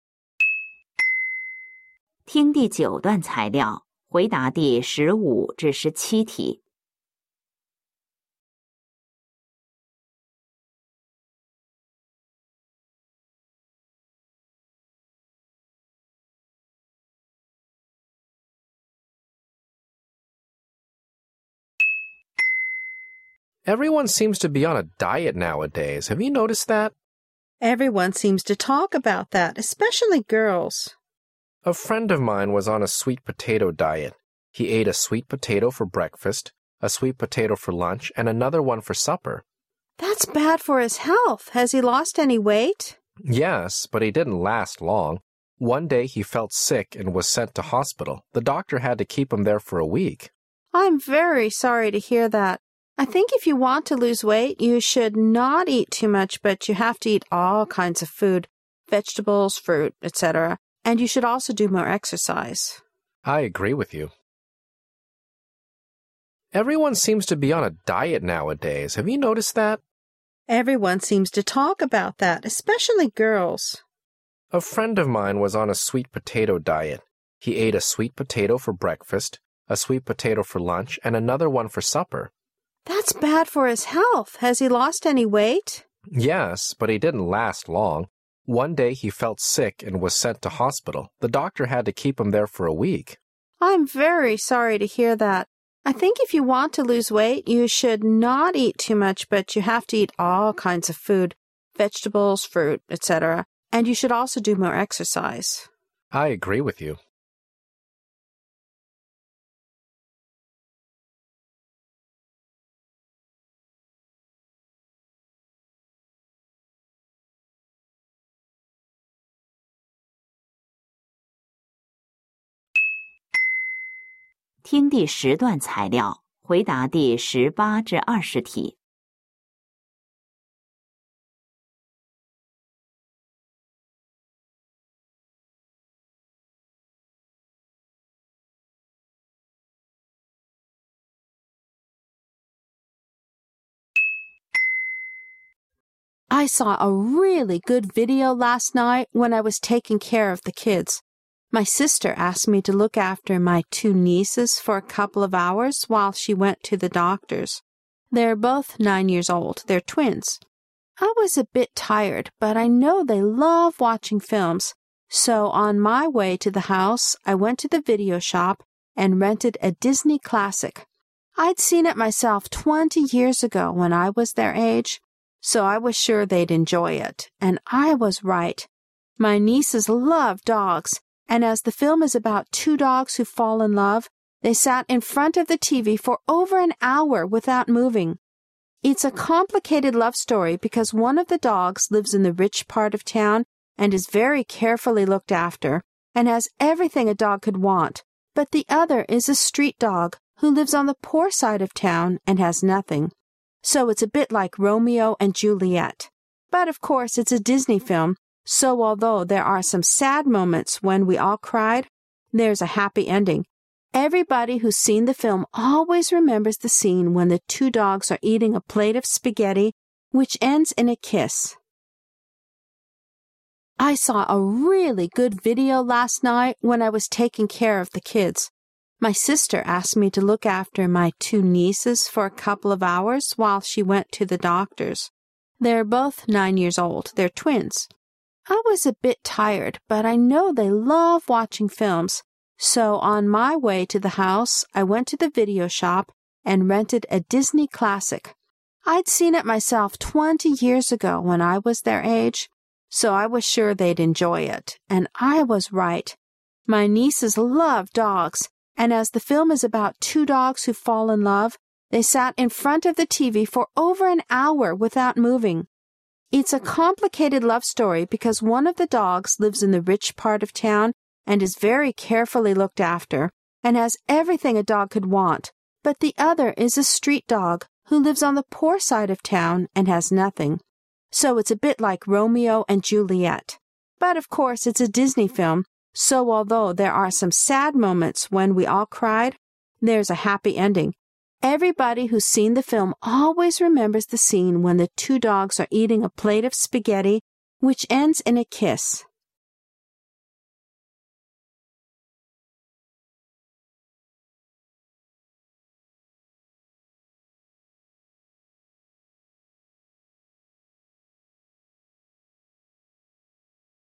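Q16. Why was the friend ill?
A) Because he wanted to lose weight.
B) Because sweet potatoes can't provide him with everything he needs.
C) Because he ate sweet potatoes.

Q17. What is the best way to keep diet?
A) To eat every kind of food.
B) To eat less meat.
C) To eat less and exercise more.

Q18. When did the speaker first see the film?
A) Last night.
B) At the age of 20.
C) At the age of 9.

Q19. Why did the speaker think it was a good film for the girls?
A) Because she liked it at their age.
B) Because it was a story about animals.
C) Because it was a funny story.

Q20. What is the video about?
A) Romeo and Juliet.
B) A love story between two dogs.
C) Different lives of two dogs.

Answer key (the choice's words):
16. Because sweet potatoes can't provide him with everything he needs.
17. To eat less and exercise more.
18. At the age of 9.
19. Because she liked it at their age.
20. A love story between two dogs.

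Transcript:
M: Everyone seems to be on a diet nowadays.Have you noticed that?
W:Everyone seems to talk about that,especially girls.
M:A friend of mine was on a sweet potato diet.He ate a sweet potato for breakfast,a sweet potato for lunch and another one for supper.
W:That's bad for his health.Has he lost any weight?
M:Yes.But he didn't last long.One day he felt sick and was sent to hospital.The doctor had to keep him there for a week.
W:I'm very sorry to hear that.I think if you want to lose weight,you should not eat too much but you have to eat all kinds of food,vegetables,fruits etc..And you should also do more exercise.
M:I agree with you.
I saw a really good video last night when I was taking care of the kids.My sister asked me to look after my two nieces for a couple of hours while she went to the doctor's.They're both nine years old,they're twins.I was a bit tired but I know they love watching films,so on my way to the house I went to the video shop and rented a Disney classic.I'd seen it myself 20 years ago when I was their age,so I was sure they'd enjoy it,and I was right.My nieces love do gs and as the film is about two dogs who fall in love,they sat in front of the TV for over an hour without moving! 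It's a complicated love story because one of the dogs lives in the rich part of town a nd is very carefully looked after and has everything a dog could want,but the other is a street dog who lives on the poor side of town and has nothing.
So it's a bit like Romeo and Juliet! But of course it's a Disney film,so although there are some sad moments when we all cried,there's a happy ending.Everybody who's seen the film always remembers the scene when the two dogs are eating a plate of spaghetti which ends in a kiss!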